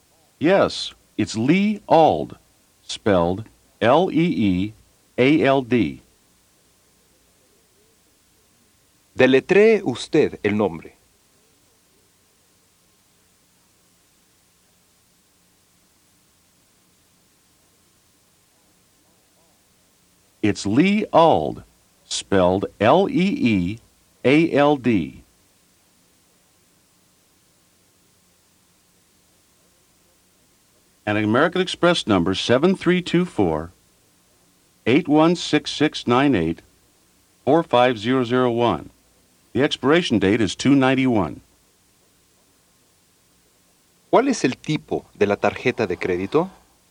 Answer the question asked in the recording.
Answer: American Express.